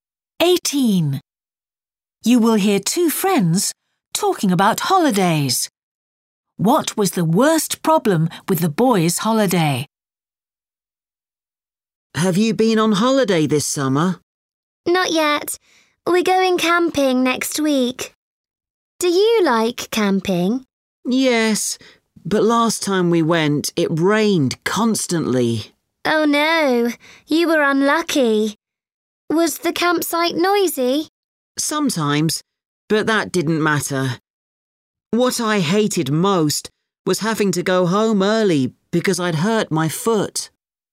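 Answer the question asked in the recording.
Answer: Having to go home early because he hurt his foot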